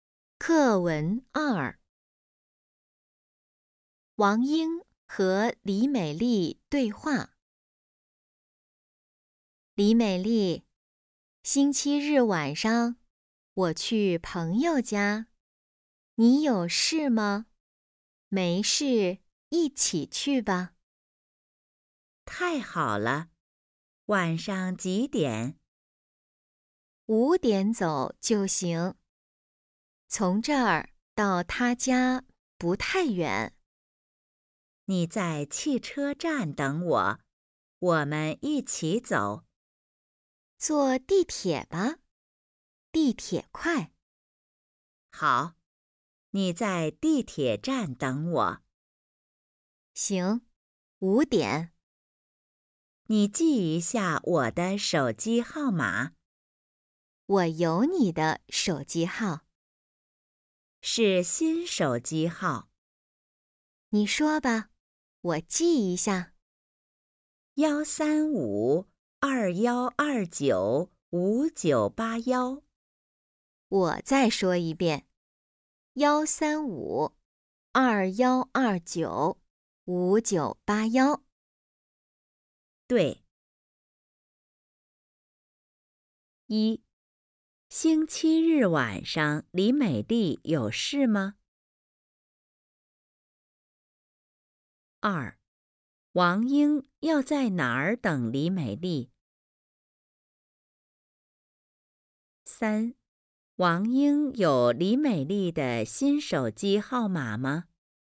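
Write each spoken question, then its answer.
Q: 星期日晚上李美丽有事吗?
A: 没事

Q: 王英要在哪儿等李美丽?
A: 地铁站

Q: 王英有李美丽的新手机号码吗?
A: 没有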